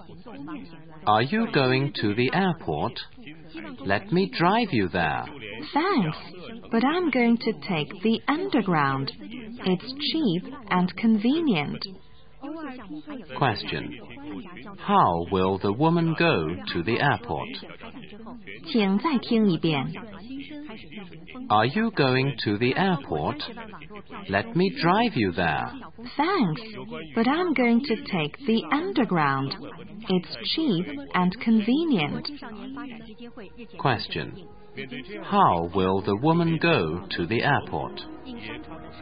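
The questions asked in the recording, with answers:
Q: How will the woman go to the airport?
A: By underground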